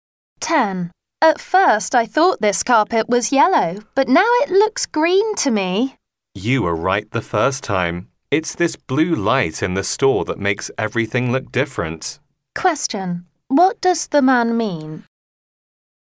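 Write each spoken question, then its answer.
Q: What does the man mean?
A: The carpet is yellow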